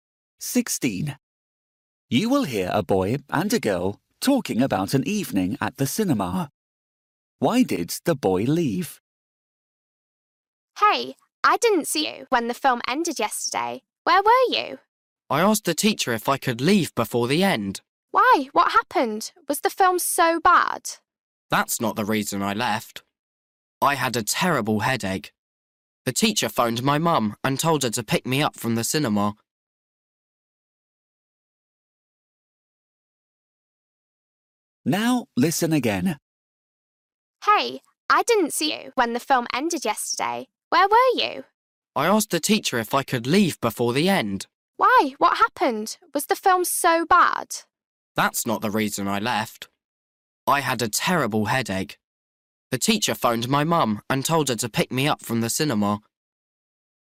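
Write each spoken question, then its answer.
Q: Why did the boy leave?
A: He had a terrible headache.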